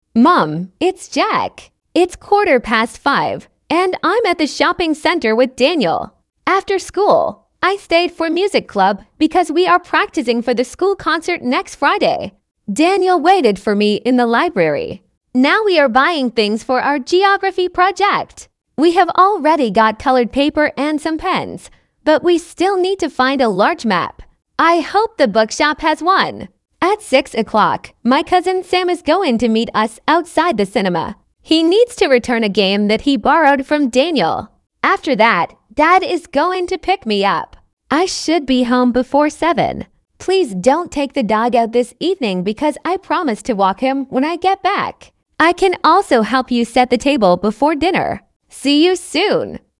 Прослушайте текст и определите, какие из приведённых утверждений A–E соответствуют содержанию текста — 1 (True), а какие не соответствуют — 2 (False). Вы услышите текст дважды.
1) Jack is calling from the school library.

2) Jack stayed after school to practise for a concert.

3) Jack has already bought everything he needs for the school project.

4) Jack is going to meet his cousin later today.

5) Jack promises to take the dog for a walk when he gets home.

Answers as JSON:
{"1": "False", "2": "True", "3": "False", "4": "True", "5": "True"}

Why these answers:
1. Джек звонит из торгового центра. В библиотеке его ждал Дэниел.
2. После уроков Джек остался в музыкальном кружке, чтобы репетировать школьный концерт.
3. Они уже купили цветную бумагу и ручки, но им всё ещё нужна большая карта.
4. В шесть часов Джек и Дэниел собираются встретиться с его двоюродным братом Сэмом.
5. Джек просит не выгуливать собаку, потому что обещал сделать это сам после возвращения домой.

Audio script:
After school, I stayed for music club because we are practising for the school concert next Friday. Daniel waited for me in the library.
Now we are buying things for our geography project. We have already got coloured paper and some pens, but we still need to find a large map. I hope the bookshop has one.
At six o'clock, my cousin Sam is going to meet us outside the cinema. He needs to return a game that he borrowed from Daniel. After that, Dad is going to pick me up.
I should be home before seven. Please don't take the dog out this evening because I promised to walk him when I get back. I can also help you set the table before dinner.
See you soon.

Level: 10kl